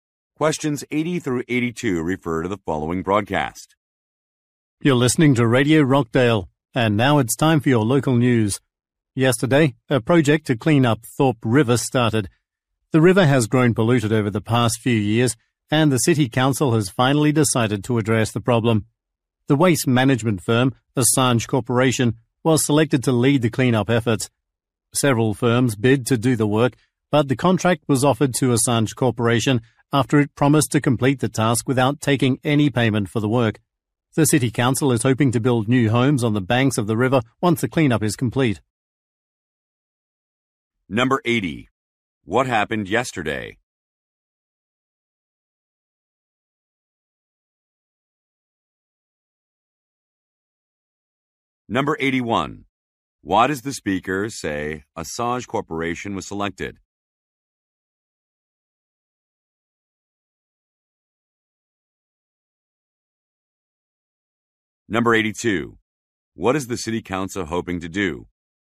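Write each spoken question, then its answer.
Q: What happened yesterday?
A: A river cleanup project started

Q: Why does the speaker say Assange Corporation was selected?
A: It offered to do the work for free

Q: What is the City Council hoping to do?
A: Build new homes by the river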